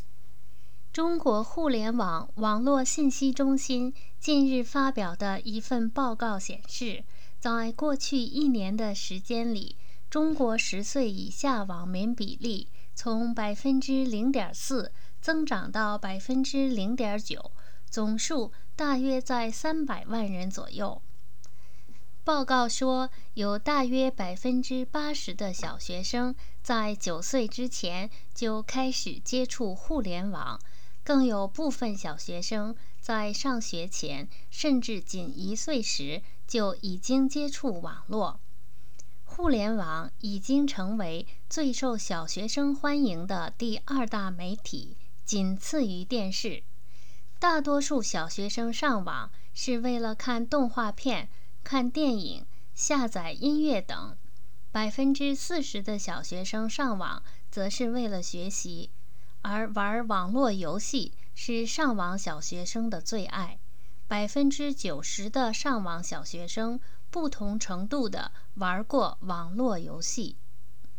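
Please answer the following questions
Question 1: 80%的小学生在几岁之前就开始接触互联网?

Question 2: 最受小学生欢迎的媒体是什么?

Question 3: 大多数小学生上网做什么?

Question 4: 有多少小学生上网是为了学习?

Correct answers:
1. 9岁
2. 电视
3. 看动画片、看电影、下载音乐等
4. 40%

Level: M.Phil Year 2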